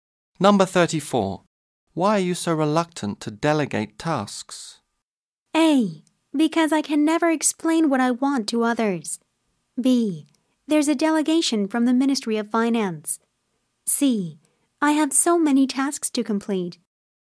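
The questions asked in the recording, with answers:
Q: Why are you so reluctant to delegate tasks?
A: A: Because I can never explain what I want to others.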